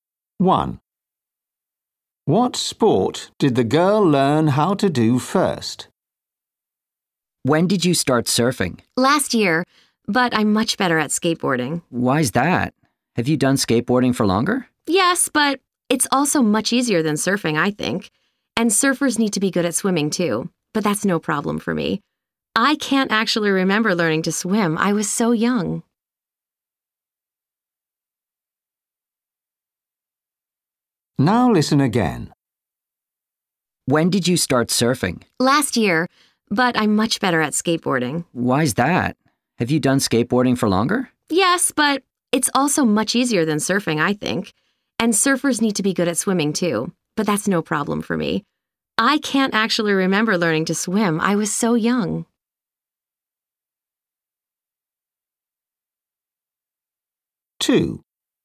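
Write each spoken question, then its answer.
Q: What sport did the girl learn how to do first?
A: swimming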